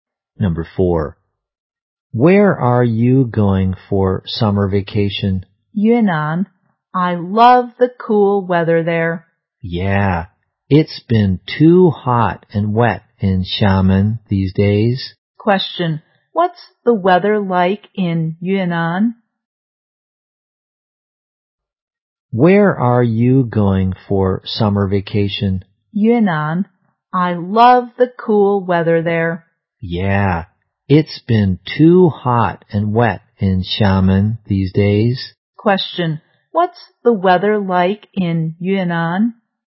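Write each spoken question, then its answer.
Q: what's the weather like in Yunnan?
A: Cool.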